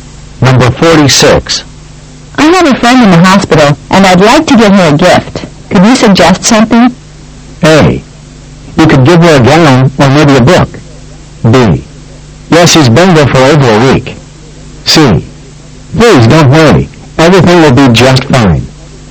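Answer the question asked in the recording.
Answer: A: You could give her a gown, or maybe a book.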